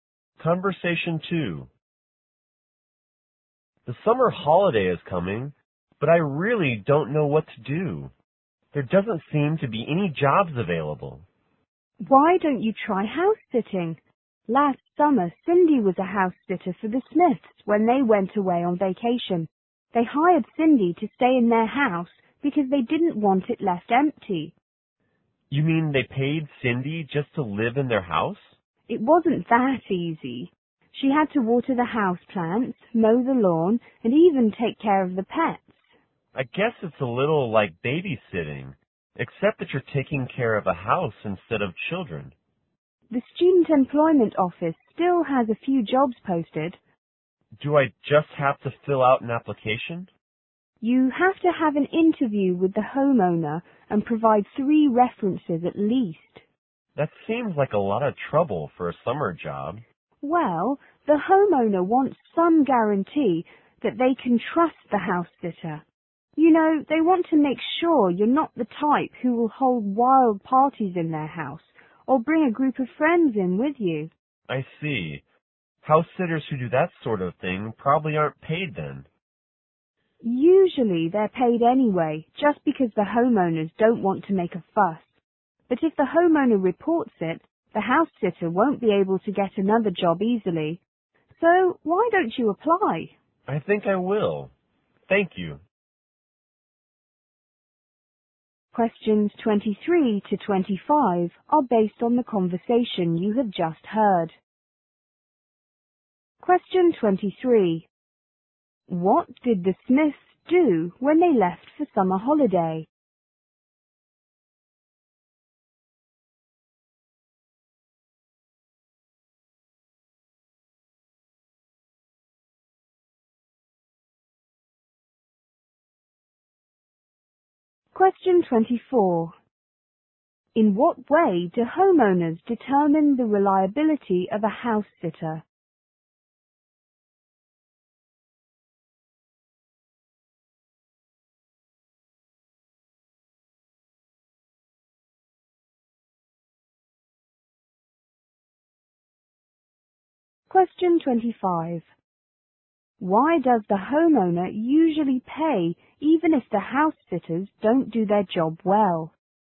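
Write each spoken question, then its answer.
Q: What did the Smiths do when they left for summer holiday?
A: They hired Cindy to house-sit

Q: In what way do homeowners determine the reliability of a house sitter?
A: An interview and at least three references

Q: Why does the homeowner usually pay even if the house sitters don't do their job well?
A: They don't want to make a fuss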